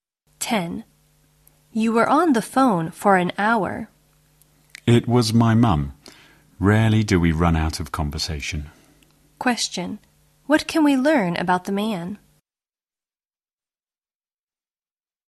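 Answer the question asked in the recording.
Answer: He and his mum always have a lot to talk about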